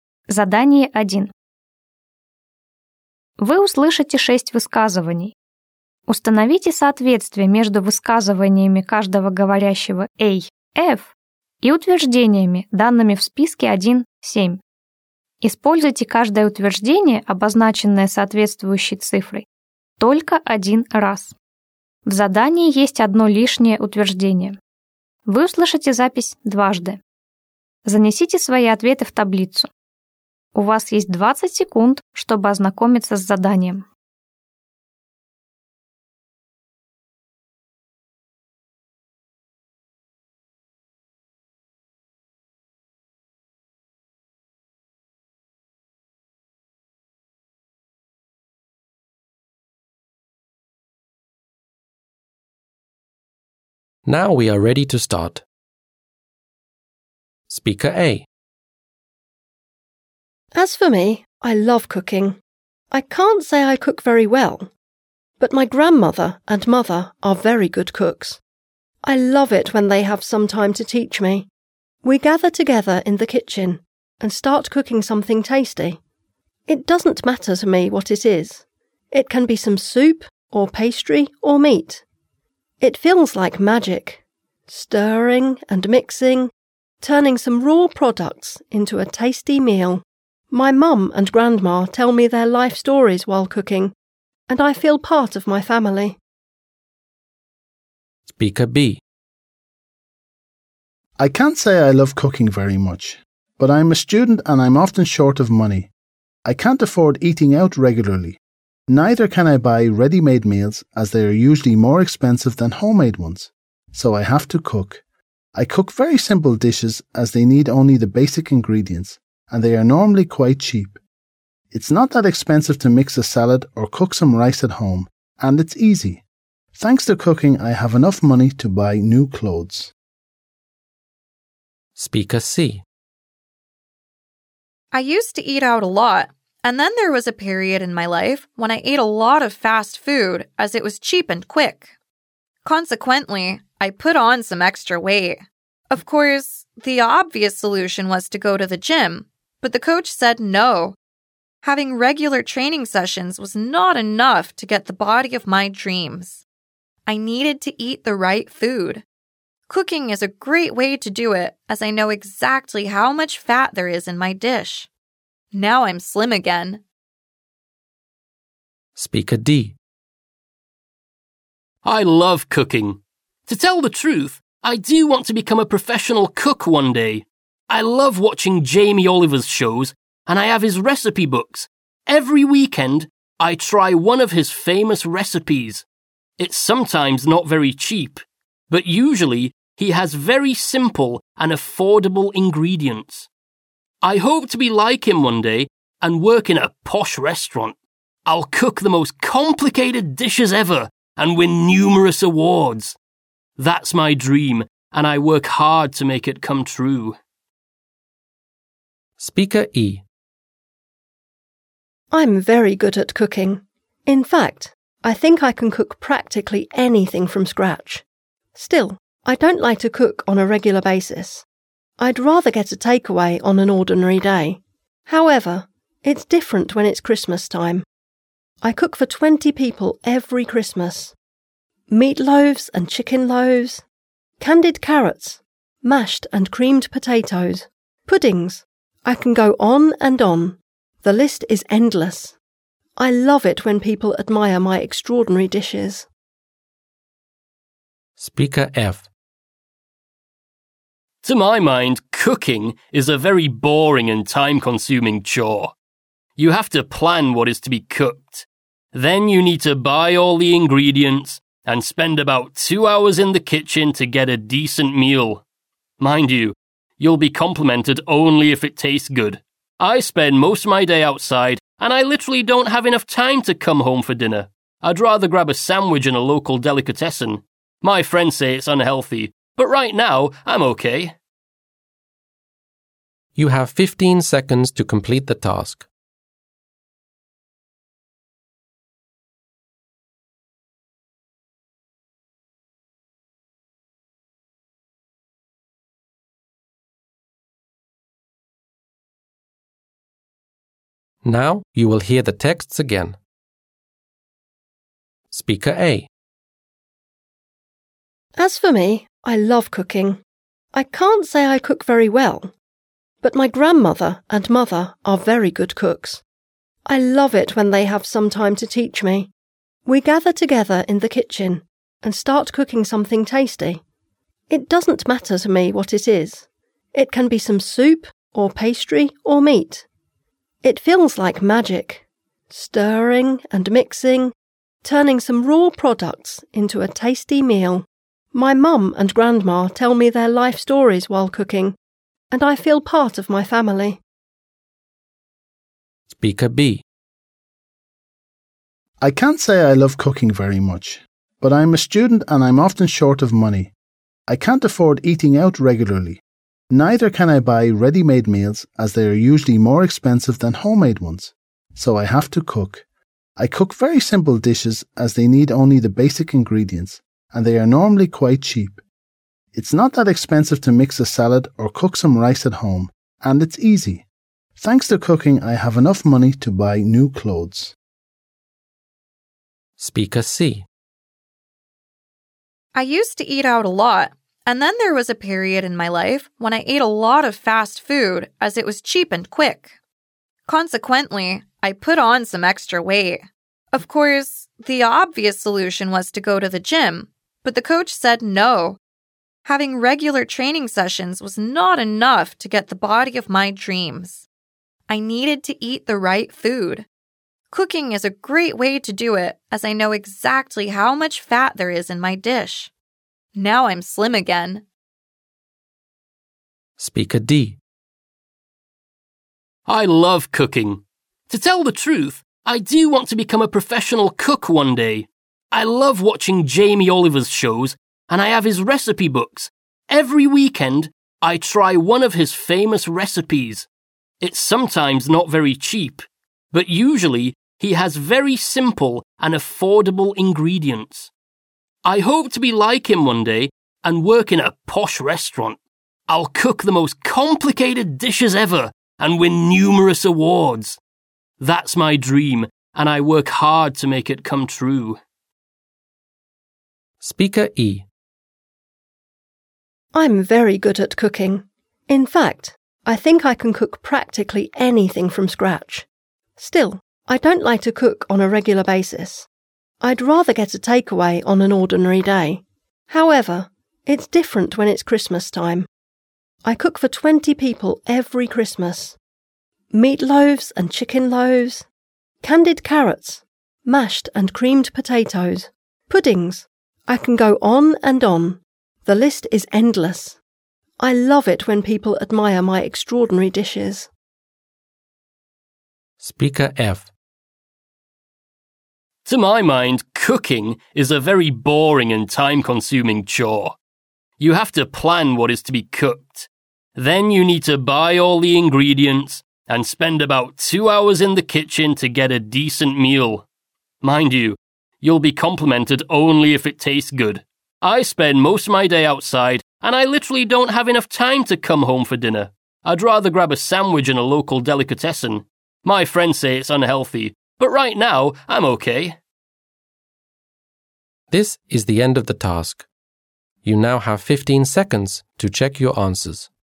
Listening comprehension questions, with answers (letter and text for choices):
Установите соответствие между высказываниями каждого говорящего A-F и утверждениями, данными в списке 1-7. Используйте каждое утверждение, обозначенное соответствующей цифрой, только один раз.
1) Cooking is always very expensive.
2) Cooking can help save some money.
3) Cooking takes too much of your time.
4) Cooking can become a great career.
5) It's great to cook on special occasions.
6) Cooking brings families together.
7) Cooking can be a way to lose weight.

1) Speaker A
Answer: 6) Cooking brings families together.

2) Speaker B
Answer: 2) Cooking can help save some money.

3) Speaker C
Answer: 7) Cooking can be a way to lose weight.

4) Speaker D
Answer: 4) Cooking can become a great career.

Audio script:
As for me, I love cooking. I can't say I cook very well, but my grandmother and mother are very good cooks. I love it when they have some time to teach me. We gather together in the kitchen and start cooking something tasty. It doesn't matter to me what it is. It can be some soup or pastry or meat. It feels like magic, stirring and mixing, turning some raw products into a tasty meal. My mum and grandma tell me their life stories while cooking, and I feel part of my family.
I can't say I love cooking very much, but I'm a student and I'm often short of money. I can't afford eating out regularly. Neither can I buy ready-made meals as they are usually more expensive than homemade ones, so I have to cook. I cook very simple dishes as they need only the basic ingredients, and they are normally quite cheap. It's not that expensive to mix a salad or cook some rice at home, and it's easy. Thanks to cooking, I have enough money to buy new clothes.»
I used to eat out a lot, and then there was a period in my life when I ate a lot of fast food as it was cheap and quick. Consequently, I put on some extra weight. Of course, the obvious solution was to go to the gym, but the coach said no. Having regular training sessions was not enough to get the body of my dreams. I needed to eat the right food. Cooking is a great way to do it as I know exactly how much fat there is in my dish. Now I'm slim again.»
I love cooking. To tell the truth, I do want to become a professional cook one day. I love watching Jamie Oliver's shows, and I have his recipe books. Every weekend, I try one of his famous recipes. It's sometimes not very cheap, but usually he has very simple and affordable ingredients. I hope to be like him one day and work in a posh restaurant. I'll cook the most complicated dishes ever and win numerous awards. That's my dream, and I work hard to make it come true.
I'm very good at cooking. In fact, I think I can cook practically anything from scratch. Still, I don't like to cook on a regular basis. I'd rather get to take away on an ordinary day. However, it's different when it's Christmas time. I cook for 20 people every Christmas. Meat loaves and chicken loaves. Mashed and creamed potatoes. Puddings. I can go on and on. The list is endless. I love it when people admire my extraordinary dishes.»
Speaker F
To my mind, cooking is a very boring and time-consuming chore. You have to plan what is to be cooked. Then you need to buy all the ingredients and spend about two hours in the kitchen to get a decent meal. Mind you, you'll be complemented only if it tastes good. I spend most of my day outside, and I literally don't have enough time to come home for dinner. I'd rather grab a sandwich in a local delicatessen. My friends say it's unhealthy, but right now, I'm okay.